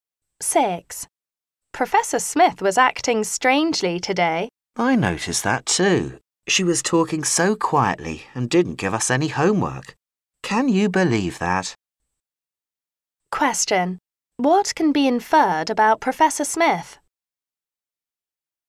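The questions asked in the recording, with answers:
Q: What can be inferred about Professor Smith?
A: She usually talks loudly and gives homework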